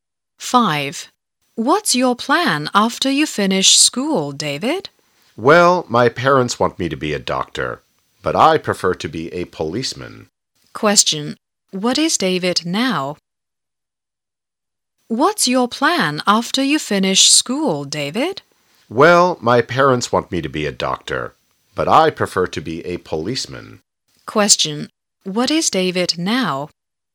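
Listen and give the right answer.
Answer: A student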